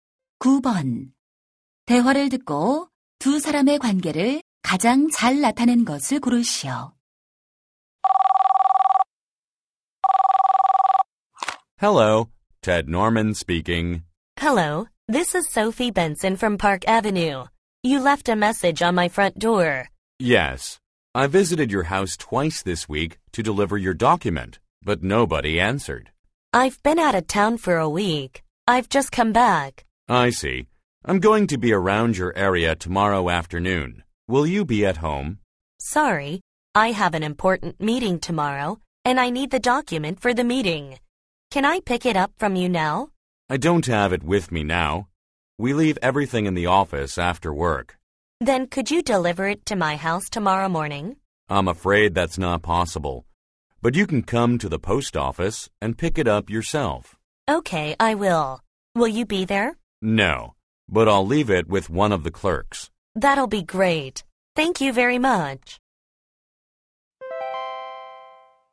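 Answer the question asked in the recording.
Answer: 우편집배원 - 수취인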